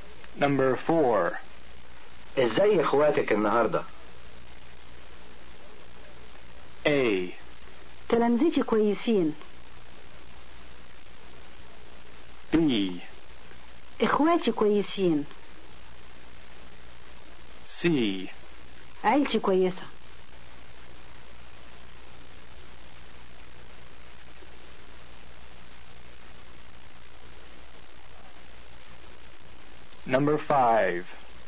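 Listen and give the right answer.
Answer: B: اخواتي كويسين.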